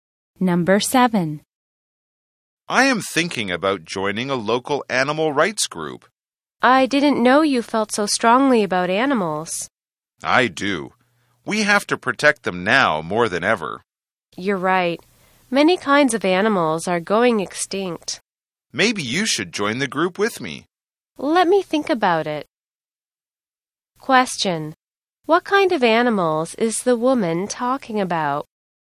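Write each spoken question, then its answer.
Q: What kind of animals is the woman talking about?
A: Endangered animals that are going extinct.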